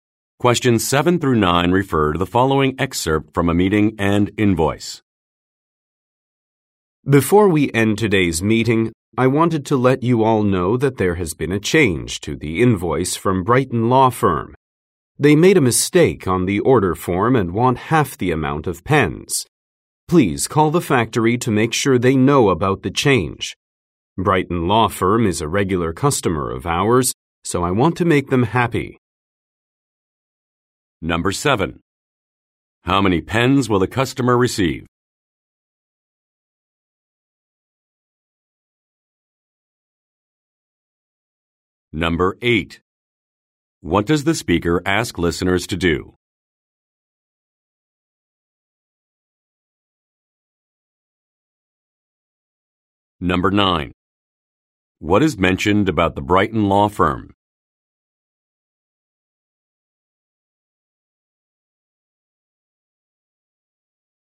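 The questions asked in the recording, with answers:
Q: What does the speaker ask listeners to do?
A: Call the factory about the change.

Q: What is mentioned about the Brighton Law Firm?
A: It is a regular customer.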